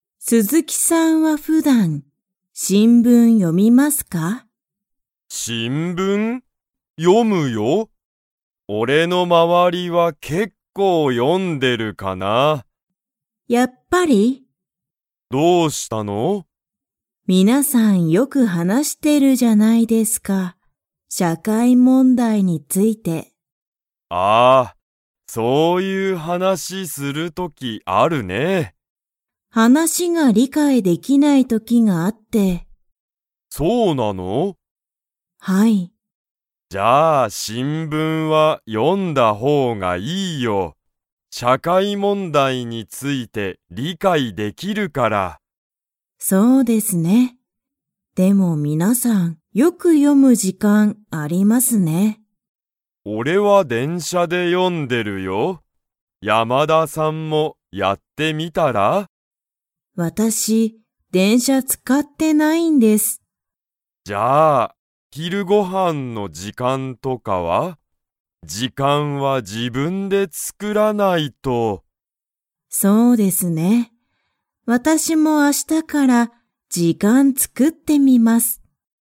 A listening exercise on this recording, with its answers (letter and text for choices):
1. 鈴木すずきさんは、新聞しんぶんを 。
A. 読よむ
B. 読よまない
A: A. 読よむ

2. 鈴木すずきさんは、どこで新聞しんぶんを読よんでいますか?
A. 会社かいしゃ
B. 学校がっこう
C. 電車でんしゃ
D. 家いえ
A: C. 電車でんしゃ

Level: Level 3